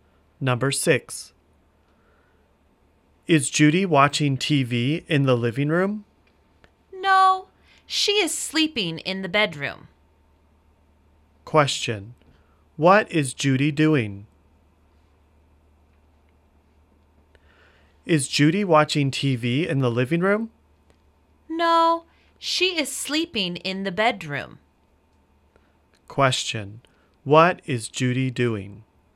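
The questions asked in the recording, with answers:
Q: what is Judy doing?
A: She is sleeping in the bedroom.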